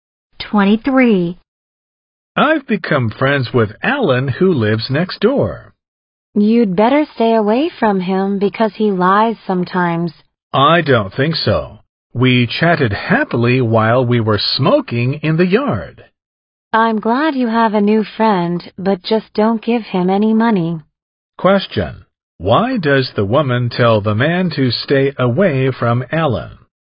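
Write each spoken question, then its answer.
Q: Why does the woman tell the man to stay away from Alan?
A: Because Alan lies sometimes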